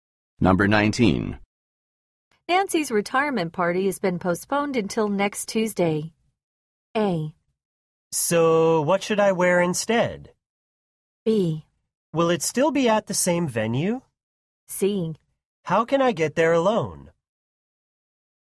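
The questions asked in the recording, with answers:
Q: Nancy's retirement party has been postponed until next Tuesday.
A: B: Will it still be at the same venue?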